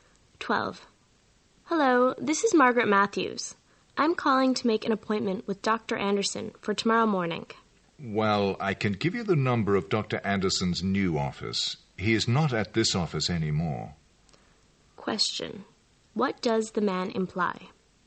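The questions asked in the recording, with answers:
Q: What does the man imply?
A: She must call Dr. Anderson's new office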